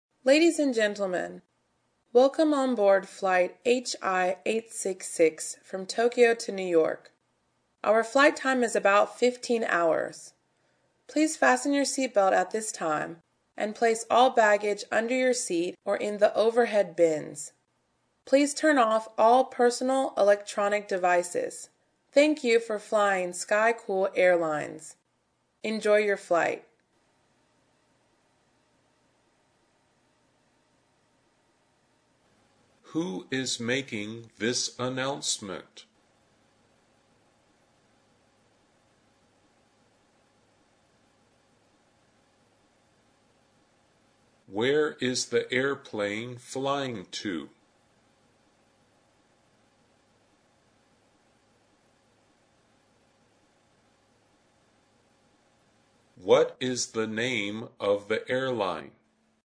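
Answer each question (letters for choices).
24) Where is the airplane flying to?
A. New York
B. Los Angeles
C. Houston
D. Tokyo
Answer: A

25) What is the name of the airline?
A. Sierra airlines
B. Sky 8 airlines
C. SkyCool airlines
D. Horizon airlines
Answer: C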